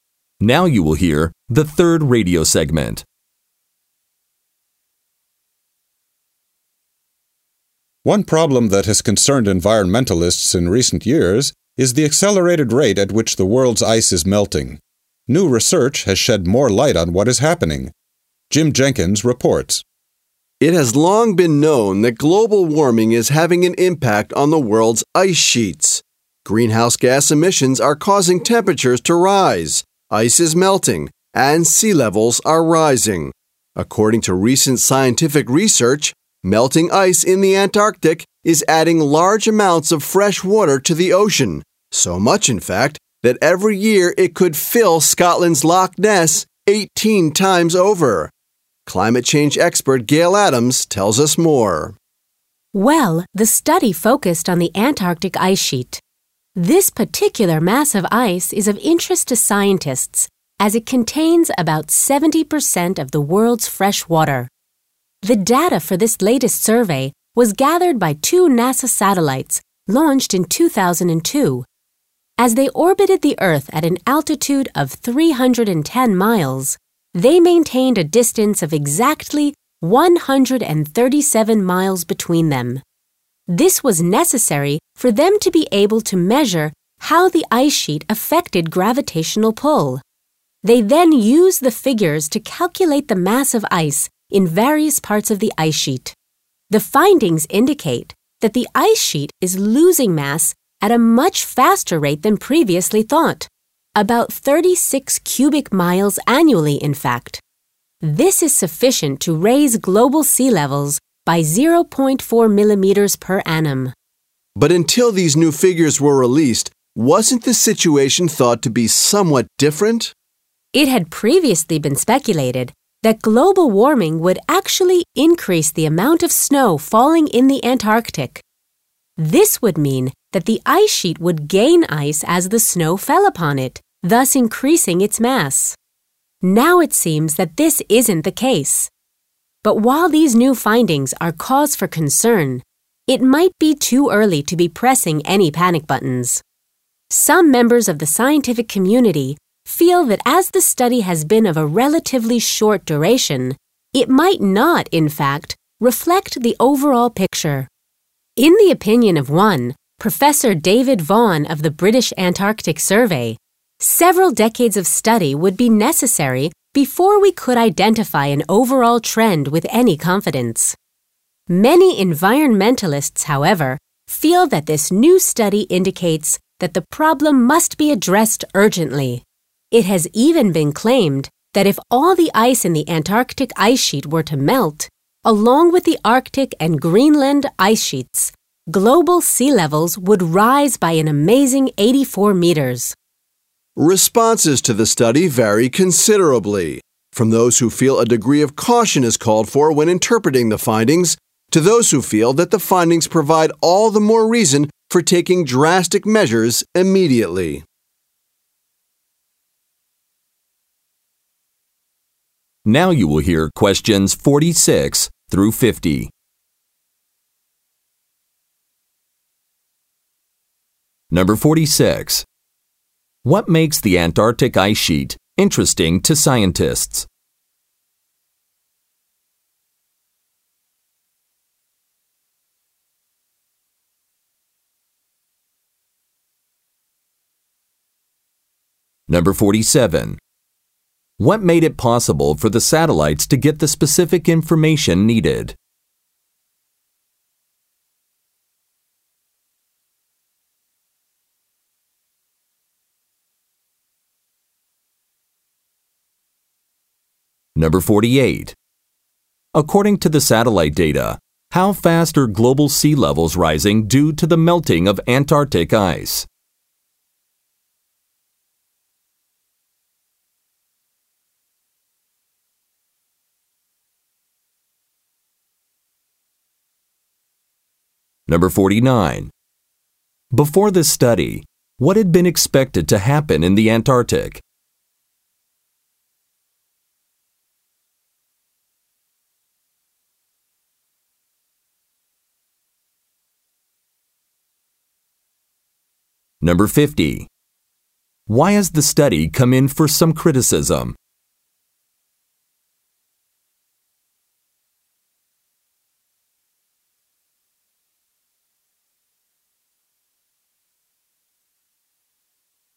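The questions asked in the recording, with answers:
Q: What makes the Antarctic ice sheet interesting to scientists?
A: It contains about 70% of the world's fresh water

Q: What made it possible for the satellites to get the specific information needed?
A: They kept exactly 137 miles apart

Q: According to the satellite data, how fast are global sea levels rising due to the melting of Antarctic ice?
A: 0.4 millimeters per year

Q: Before this study, what had been expected to happen in the Antarctic?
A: More snowfall would increase the ice sheet's mass

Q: Why has the study come in for some criticism?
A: It covered too short a period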